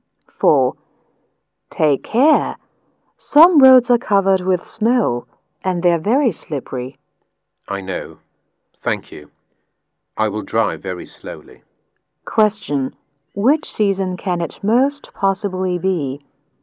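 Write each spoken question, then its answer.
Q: Which season can it most possibly be?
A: Winter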